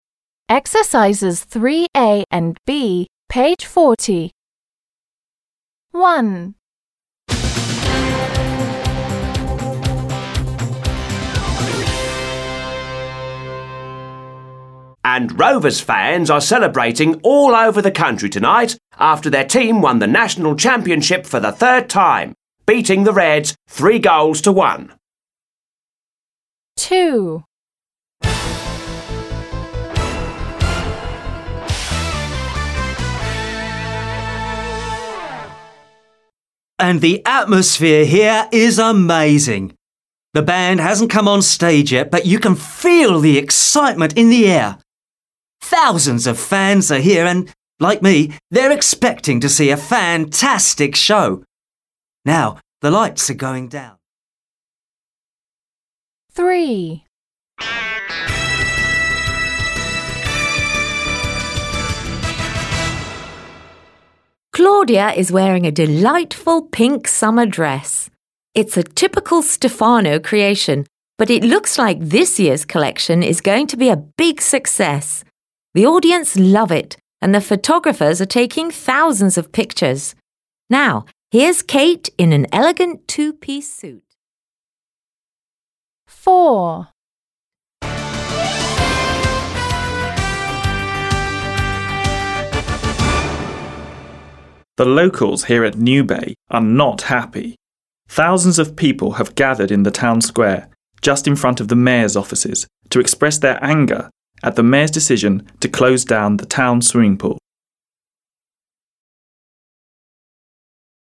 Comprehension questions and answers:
Listen to the reports. Which is about:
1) a pop concert?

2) a fashion show?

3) a demonstration?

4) football finals?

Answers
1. 2
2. 3
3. 4
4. 1

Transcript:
1. And Rovers fans are celebrating all over the country tonight after their team won the National Championship for the third time beating the Rats 3 goals to one!
2. And the atmosphere here is amazing. The band hasn't come on stage yet but you can feel the excitement in the air. Thousands of fans are here and like me they're expecting to see a fantastic show. Now the lights are going down...
Claudia is wearing a delightful pink summer dress. It's a typical Stephano creation, but it looks like this year collection is going to be a big success. The audience love it! And the photographers are taking thousands of pictures. Now here is Kate in an elegant two−piece suit...
The locals here at New Bay are not happy. Thousands of people have gathered in the town square just in front of the Major's offices to express their anger at the Major's decision to close down the town swimming pool.

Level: 7 класс